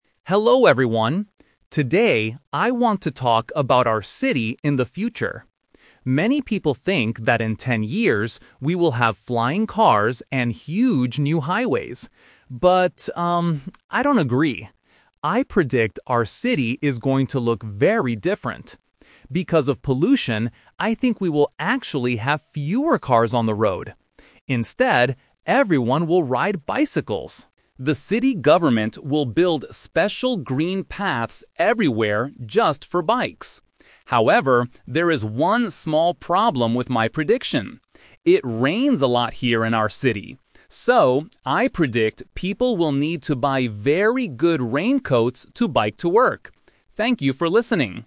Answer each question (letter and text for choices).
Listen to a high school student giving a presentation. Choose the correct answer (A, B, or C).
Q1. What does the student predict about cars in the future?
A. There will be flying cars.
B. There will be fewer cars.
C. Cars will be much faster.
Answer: B. There will be fewer cars.

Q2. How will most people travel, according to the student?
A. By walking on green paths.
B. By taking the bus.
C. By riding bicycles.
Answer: C. By riding bicycles.

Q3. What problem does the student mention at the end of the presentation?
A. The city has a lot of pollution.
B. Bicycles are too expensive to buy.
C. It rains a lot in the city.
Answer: C. It rains a lot in the city.

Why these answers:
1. The student explicitly says, "I think we will actually have fewer cars on the road."
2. The student predicts, "Instead, everyone will ride bicycles!"
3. At the end, the student points out a problem: "It rains a lot here in our city! So, I predict people will need to buy very good raincoats..."

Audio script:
Hello everyone. Today, I want to talk about our city in the future. Many people think that in ten years, we will have flying cars and huge new highways. I don't agree.
I predict our city is going to look very different. Because of pollution, I think we will actually have fewer cars on the road. Instead, everyone will ride bicycles! The city government will build special green paths everywhere just for bikes.
However, there is one small problem with my prediction. It rains a lot here in our city! So, I predict people will need to buy very good raincoats to bike to work. Thank you for listening.